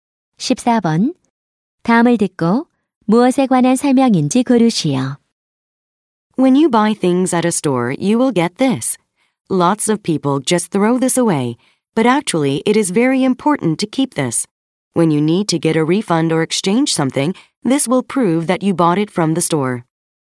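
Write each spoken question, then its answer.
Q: 다음을 듣고 무엇에 관한 설명인지 고르시오.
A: 영수증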